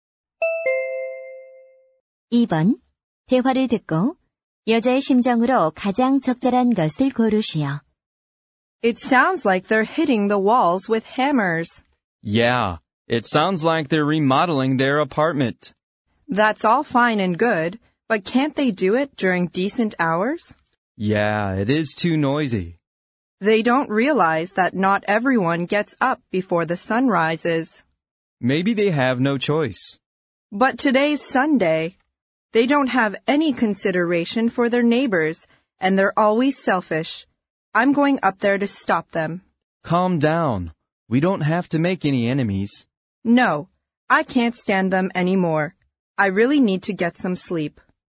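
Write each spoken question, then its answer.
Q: 대화를 듣고 여자의 심정으로 가장 적절한 것을 고르시오.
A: 짜증남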